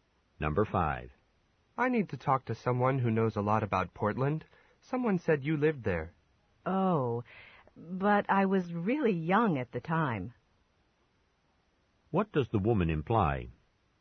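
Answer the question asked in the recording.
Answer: She may not know much about Portland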